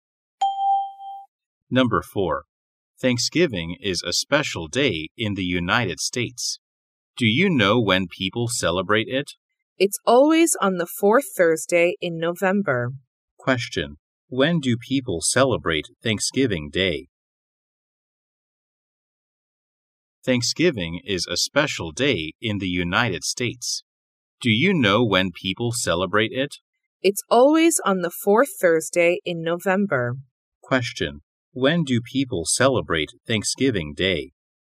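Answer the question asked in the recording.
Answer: On the fourth Thursday in November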